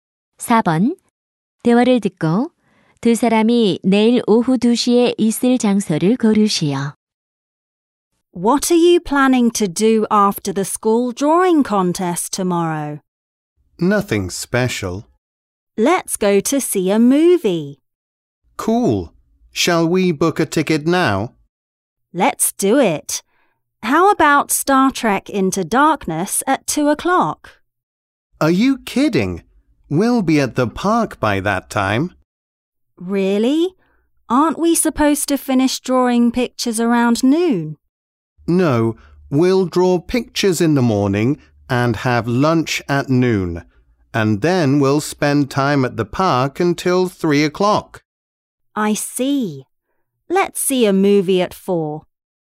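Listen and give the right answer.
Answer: 공원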